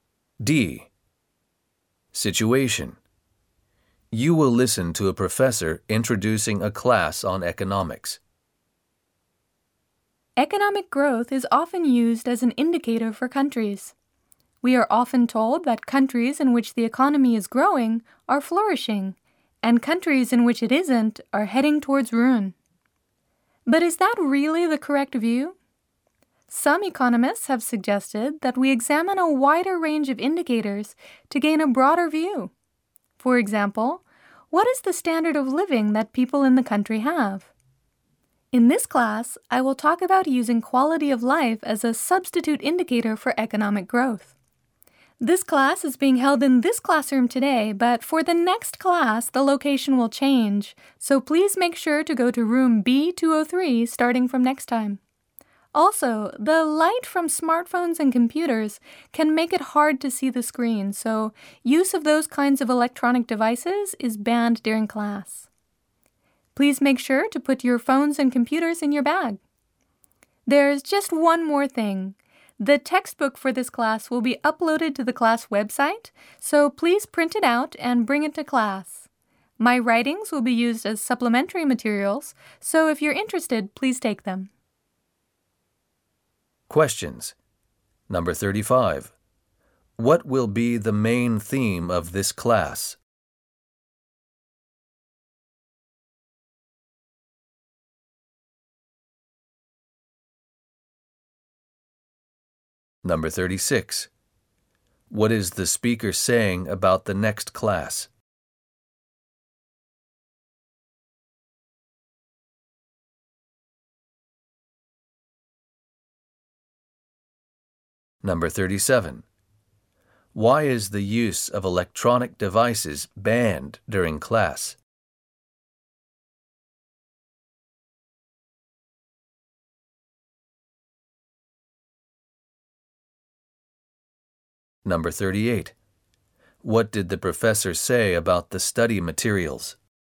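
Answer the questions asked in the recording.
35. Using quality of life as a substitute indicator for economic growth
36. It will be held in room B203
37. Their light can make it hard to see the screen
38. The textbook will be uploaded to the class website to print and bring; his writings are optional supplementary materials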